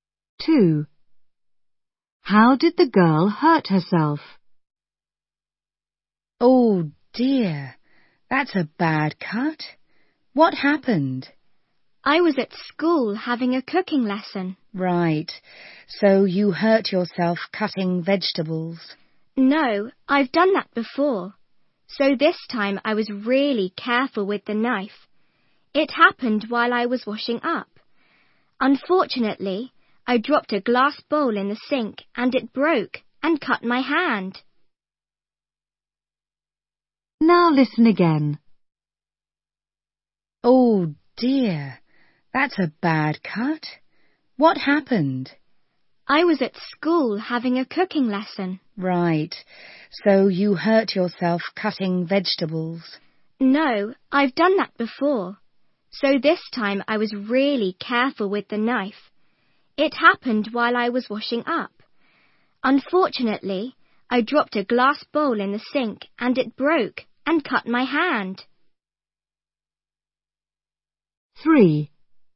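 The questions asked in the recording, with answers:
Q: How did the girl hurt herself?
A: She cut her hand on a broken glass bowl while washing up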